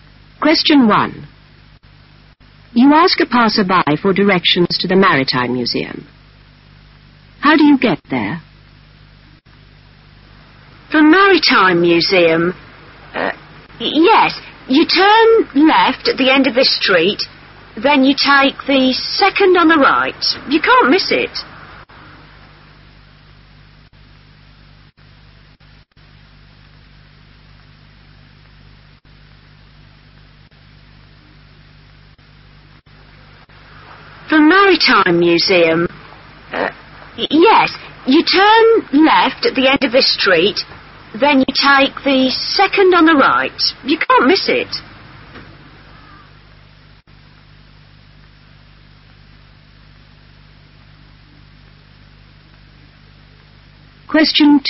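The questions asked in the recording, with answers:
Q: How do you get there?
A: Turn left at the end of this street, then take the 2nd on the right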